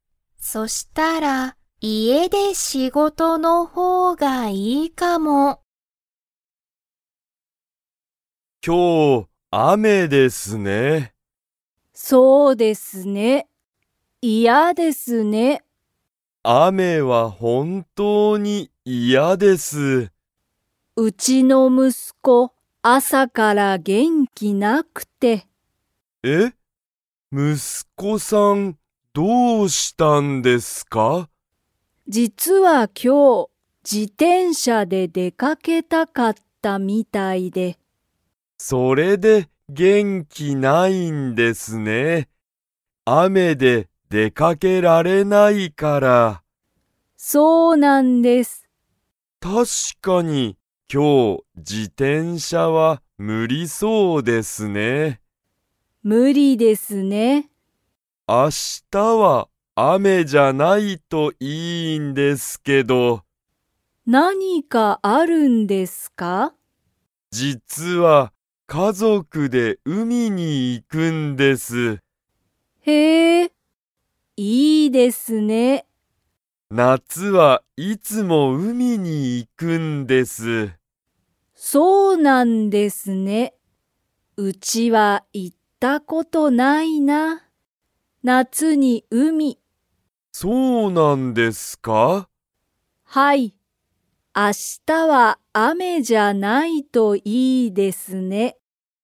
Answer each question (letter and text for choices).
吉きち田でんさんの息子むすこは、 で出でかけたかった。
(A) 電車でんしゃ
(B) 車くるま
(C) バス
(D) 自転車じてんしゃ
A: (D) 自転車じてんしゃ

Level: Level 3